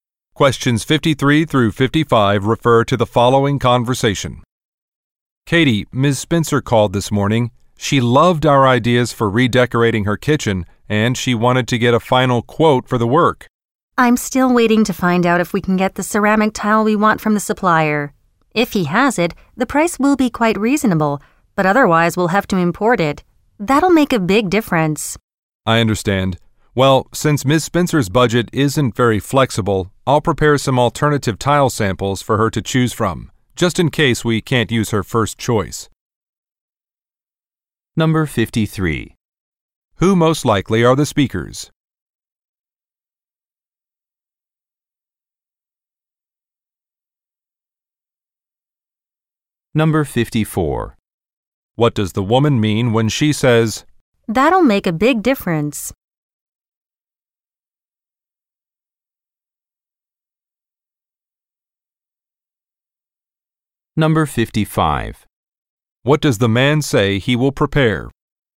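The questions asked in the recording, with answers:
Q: Who most likely are the speakers?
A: Interior designers

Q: What does the woman mean when she says,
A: Importing the tile would raise the price a lot

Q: What does the man say he will prepare?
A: Alternative tile samples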